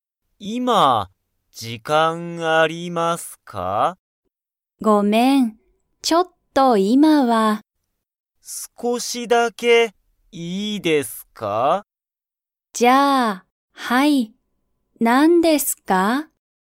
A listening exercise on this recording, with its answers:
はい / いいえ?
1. 二人(ふたり)は少(すこ)しだけ話(はな)しますか?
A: はい

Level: Level 1